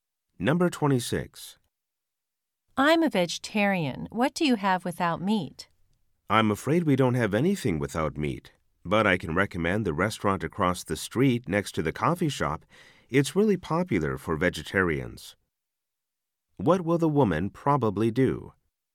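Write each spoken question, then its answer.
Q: What will the woman probably do?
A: Go to the restaurant across the street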